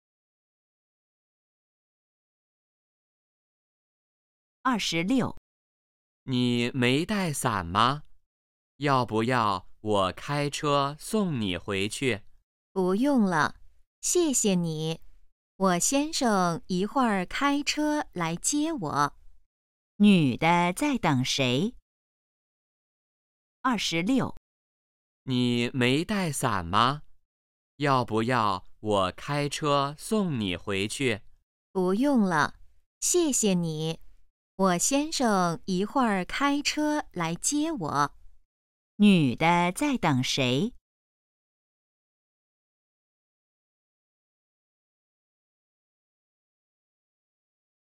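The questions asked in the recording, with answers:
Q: 女的在等谁?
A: 她先生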